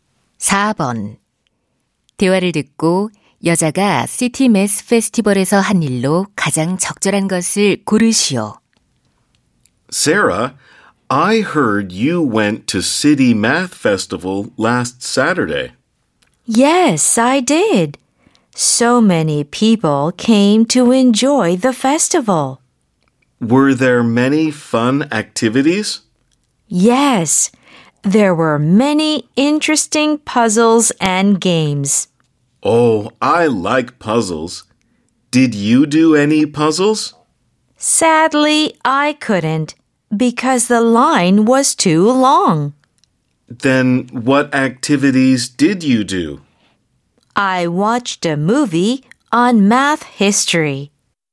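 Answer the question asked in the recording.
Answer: 수학 역사에 관한 영화 관람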